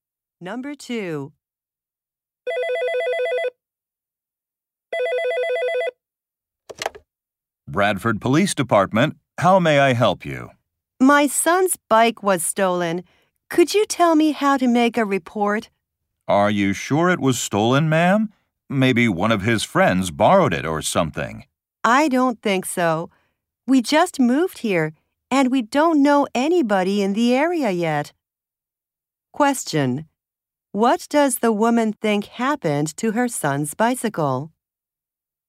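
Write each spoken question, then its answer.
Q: What does the woman think happened to her son's bicycle?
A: Someone stole it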